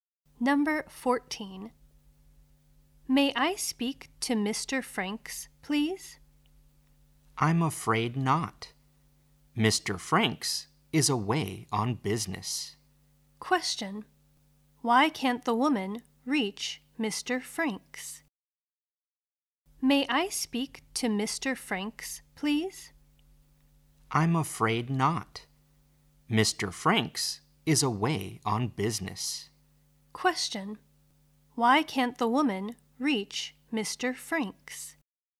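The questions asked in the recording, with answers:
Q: Why can't the woman reach Mr.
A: He is away on business.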